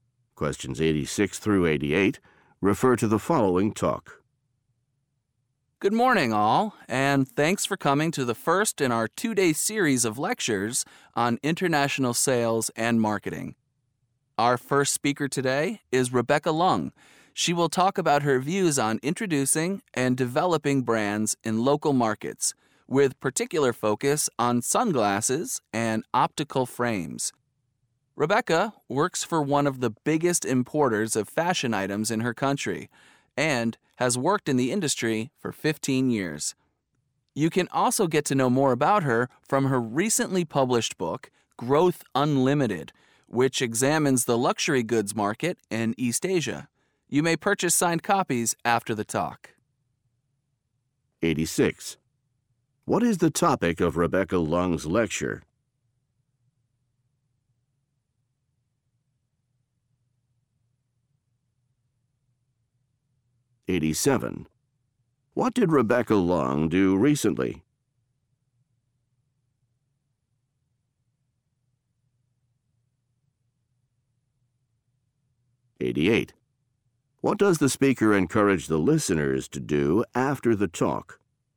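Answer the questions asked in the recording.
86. Introducing and developing brands in local markets
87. Published a book
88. Buy signed copies of her book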